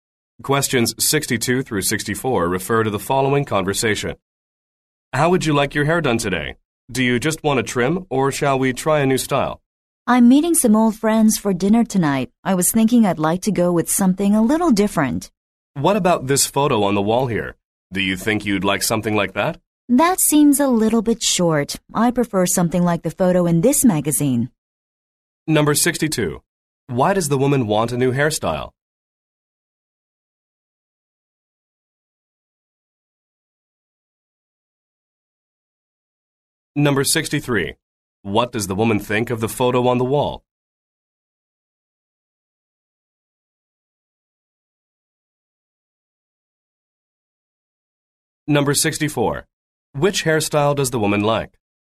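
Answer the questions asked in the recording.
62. She is meeting old friends for dinner
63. The style is a little too short
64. The one in the magazine photo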